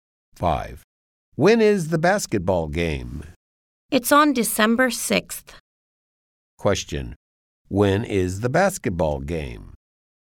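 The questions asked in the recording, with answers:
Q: When is the basketball game?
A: December 6th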